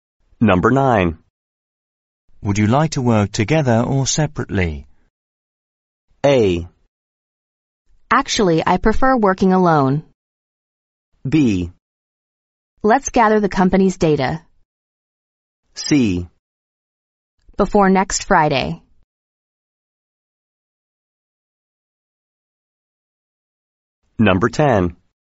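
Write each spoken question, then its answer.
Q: Would you like to work together or separately?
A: A: Actually, I prefer working alone.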